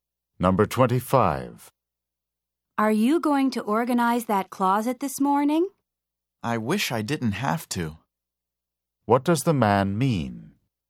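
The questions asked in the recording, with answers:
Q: What does the man mean?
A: He doesn't want to organize the closet.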